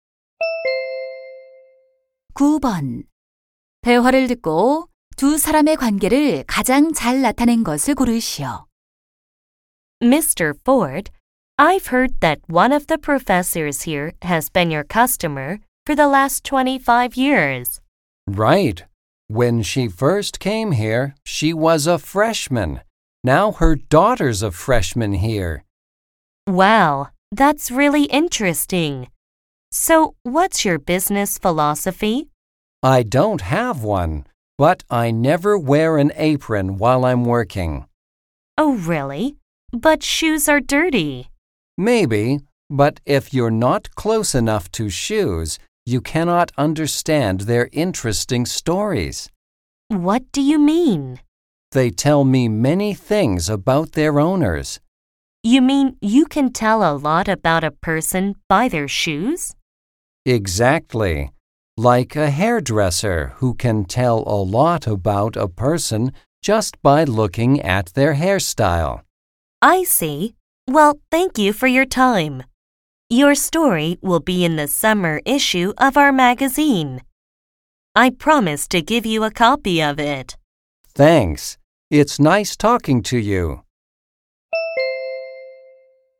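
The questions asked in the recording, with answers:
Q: 대화를 듣고 두 사람의 관계를 가장 잘 나타낸 것을 고르시오.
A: 잡지 기자 - 구두 수선공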